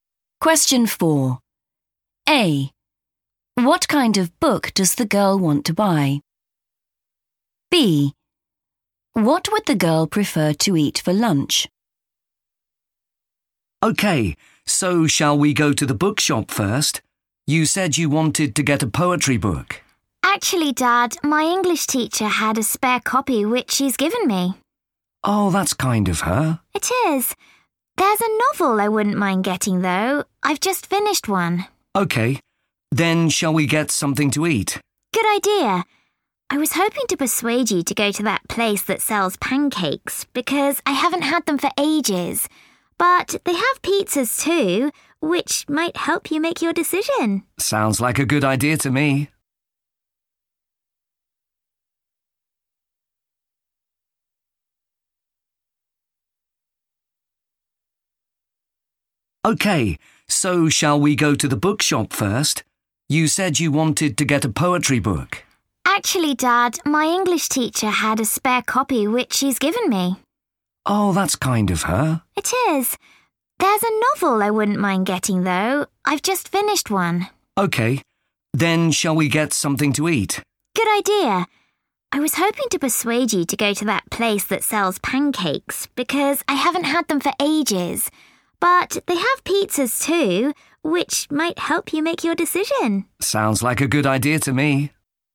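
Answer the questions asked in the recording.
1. a novel
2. pancakes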